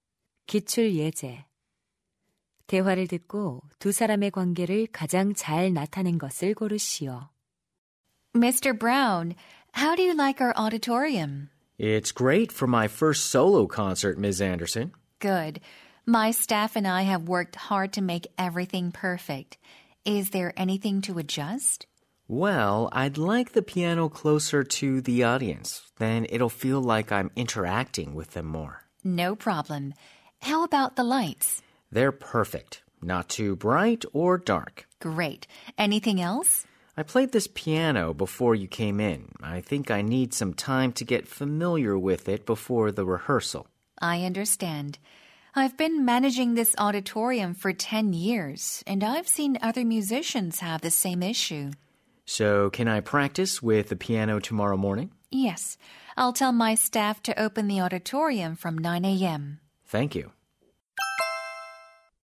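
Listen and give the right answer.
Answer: 피아니스트 - 공연장 관리자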